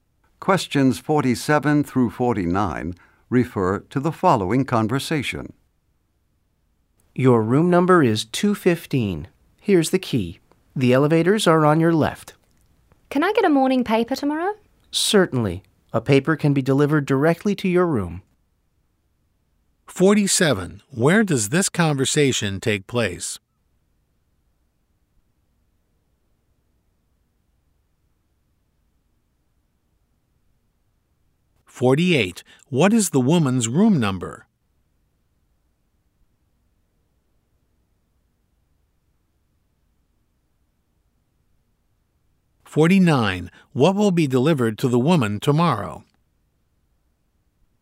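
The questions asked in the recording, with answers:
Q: Where does this conversation take place?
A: At a hotel

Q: What is the woman's room number?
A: 215

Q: What will be delivered to the woman tomorrow?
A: A morning paper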